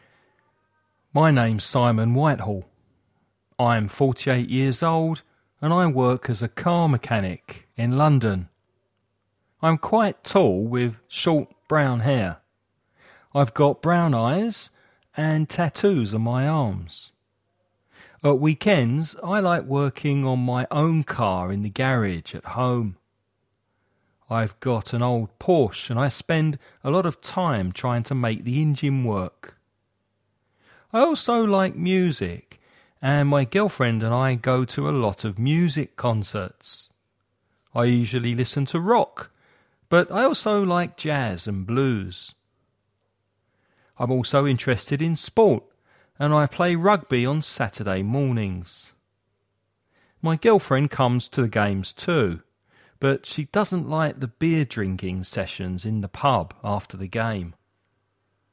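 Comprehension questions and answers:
Escucha el audio y completa el ejercicio.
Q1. How old is Simon?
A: 48

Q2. What does Simon do for a living?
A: He is a car mechanic

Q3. What kind of music does he like?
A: Rock, jazz and blues

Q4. What sport does he play at weekends?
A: Rugby

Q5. Where does he go with his teammates and his girlfriend after the game?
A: To the pub

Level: nivel básico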